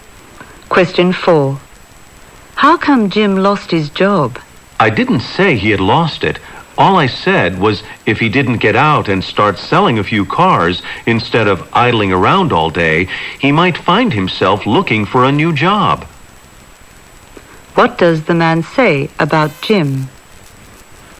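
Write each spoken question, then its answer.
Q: What does the man say about Jim?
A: Jim hasn't lost his job, but he might if he doesn't stop idling and start selling cars.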